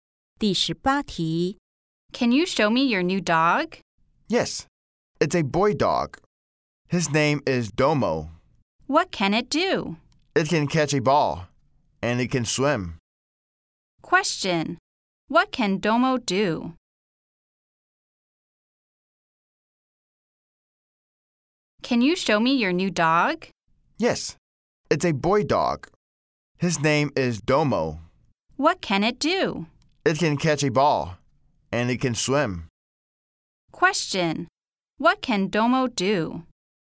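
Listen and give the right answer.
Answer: It can catch a ball and swim.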